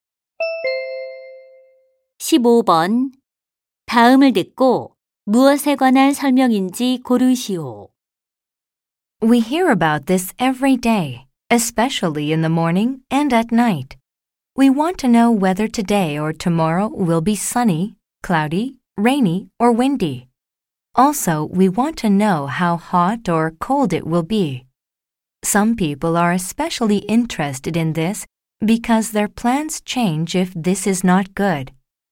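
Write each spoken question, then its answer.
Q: 다음을 듣고 무엇에 관한 설명인지 고르시오.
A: 일기 예보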